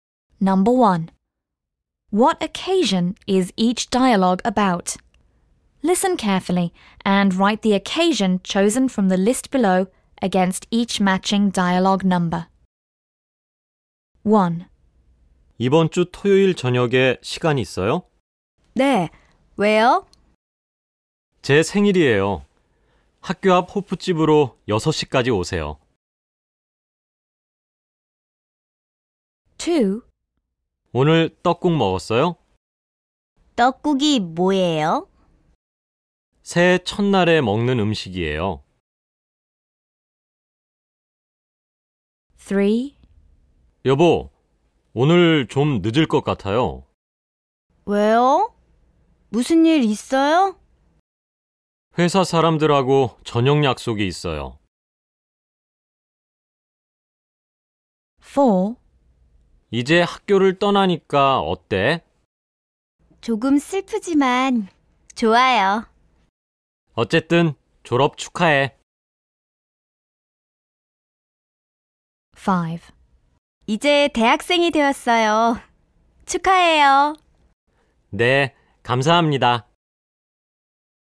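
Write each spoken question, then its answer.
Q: What occasion is each dialogue about?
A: Birthday

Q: What occasion is each dialogue about?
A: New Year's Day

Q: What occasion is each dialogue about?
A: Graduation

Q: What occasion is each dialogue about?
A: Entering university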